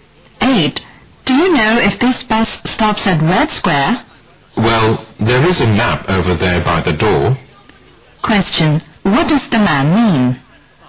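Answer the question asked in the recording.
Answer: The woman should check the map by the door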